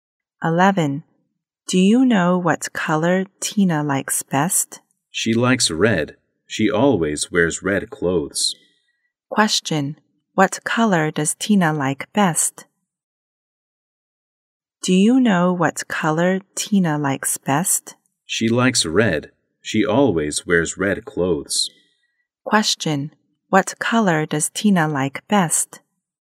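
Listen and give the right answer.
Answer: Red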